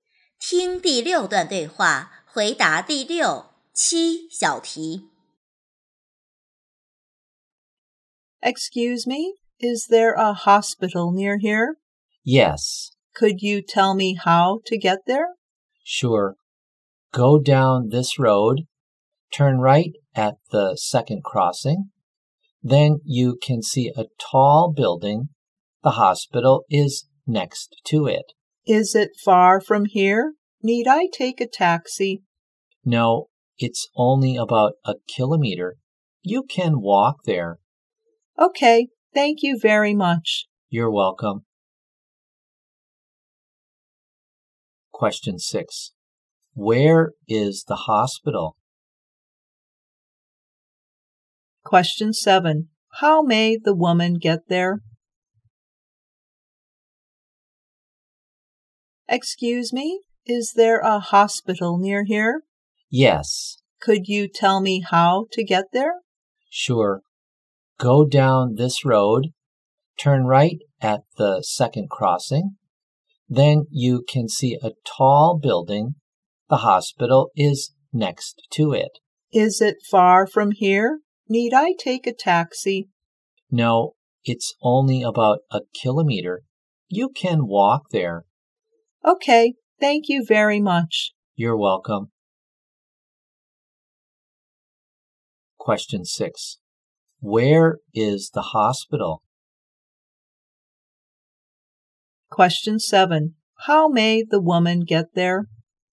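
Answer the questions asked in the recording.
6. Next to a tall building
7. On foot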